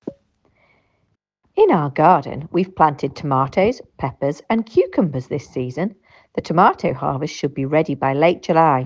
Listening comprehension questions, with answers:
Answer the following questions. Write NO MORE THAN TWO WORDS AND/OR A NUMBER for each answer.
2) When will the tomato harvest be ready?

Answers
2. late July

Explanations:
The tomato harvest should be ready by late July.